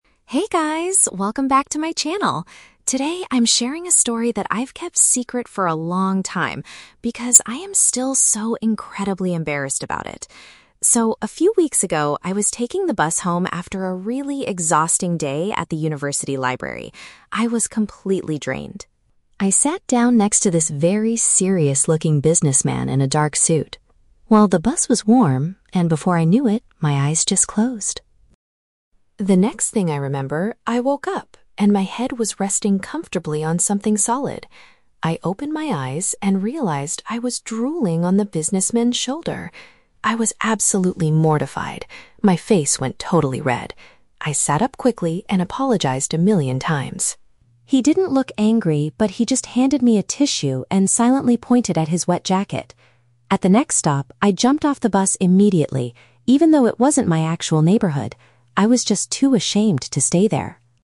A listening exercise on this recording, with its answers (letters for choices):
Listen to a vlogger talking about an embarrassing experience. Choose the correct answer (A, B, or C) for each question.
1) Why did the vlogger fall asleep on the bus?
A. She had consumed a heavy meal before the trip.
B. She was physically extremely tired after studying.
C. She was feeling bored because the journey was long.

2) What was the businessman's reaction when the vlogger woke up?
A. He shouted at her for ruining his expensive clothes.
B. He gave her an item to help clean up the mess.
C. He quickly moved to a different seat on the bus.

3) How did the vlogger escape the awkward situation?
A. She offered to pay the man for cleaning his jacket.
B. She covered her red face with a tissue and hid.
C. She exited the vehicle before reaching her destination.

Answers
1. B
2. B
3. C

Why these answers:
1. The vlogger says she had an "exhausting day at the university library" and was "completely drained." This is a paraphrase for being extremely tired after studying. The Trap (C): The bus ride might have been long, but she didn't fall asleep out of boredom; she explicitly states she was exhausted. The Plausible (A): Eating a heavy meal often makes people sleepy, but this is never mentioned in the audio.
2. The vlogger explains that the man "handed me a tissue and silently pointed at his wet jacket." Handing a tissue is paraphrased as giving an item to clean up the mess. The Trap (A): The businessman pointed at his jacket, but the vlogger says "He didn't look angry" and he did it "silently." He definitely did not shout at her. The Plausible (C): Moving to another seat is a very normal reaction in this situation, but the audio does not say that he moved.
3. The vlogger says, "I jumped off the bus immediately, even though it wasn't my actual neighborhood." This means she exited the vehicle before her final destination. The Trap (B): A "tissue" and her "red face" are mentioned in the story, but she didn't use the tissue to hide her face; the man gave it to her because she was drooling on him. The Plausible (A): Offering to pay for dry cleaning is a polite way to solve the problem, but she was too "ashamed" and just ran away instead.

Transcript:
Vlogger: Hey guys, welcome back to my channel! Today, I'm sharing a story that I've kept secret for a long time because I am still so incredibly embarrassed about it. So, a few weeks ago, I was taking the bus home after a really exhausting day at the university library. I was completely drained. I sat down next to this very serious-looking businessman in a dark suit. Well, the bus was warm, and before I knew it, my eyes just closed.
The next thing I remember, I woke up, and my head was resting comfortably on something solid. I opened my eyes and realized I was drooling on the businessman's shoulder! I was absolutely mortified. My face went totally red. I sat up quickly and apologized a million times. He didn't look angry, but he just handed me a tissue and silently pointed at his wet jacket. At the next stop, I jumped off the bus immediately, even though it wasn't my actual neighborhood. I was just too ashamed to stay there!